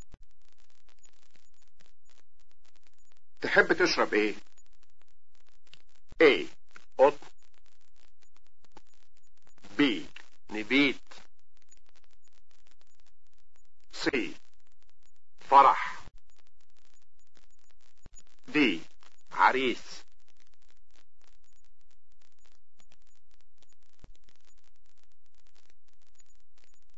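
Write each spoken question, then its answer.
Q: تحب تشرب ايه؟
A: B: نبيت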